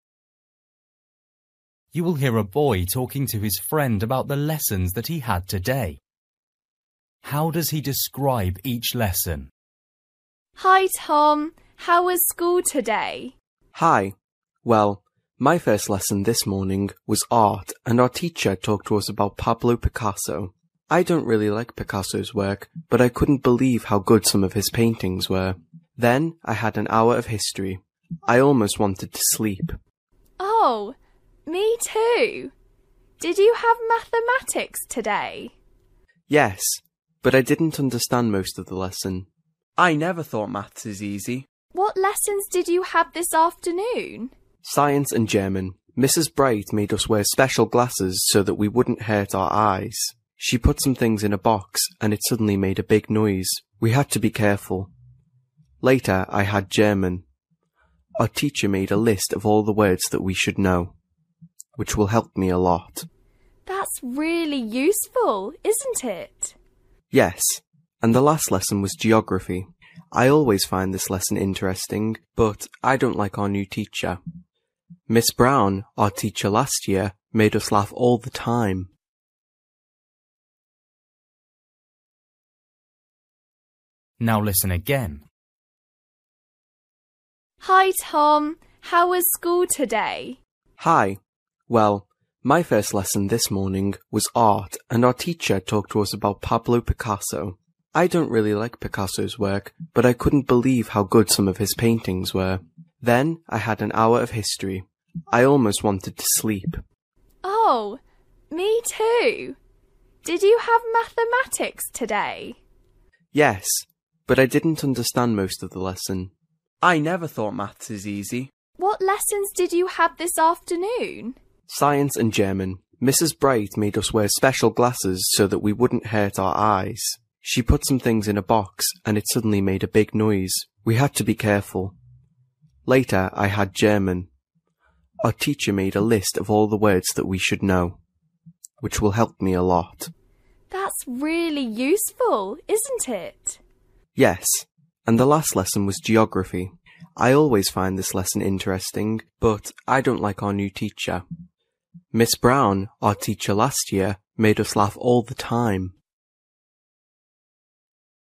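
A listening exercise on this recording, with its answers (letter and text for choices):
For each question, choose the correct answer.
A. interesting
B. funny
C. difficult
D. dangerous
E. boring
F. surprising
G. easy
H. useful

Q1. History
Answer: E. boring

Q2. Mathematics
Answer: C. difficult

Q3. Science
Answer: D. dangerous

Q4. German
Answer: H. useful

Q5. Geography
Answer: A. interesting

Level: Luyện nghe trình độ A2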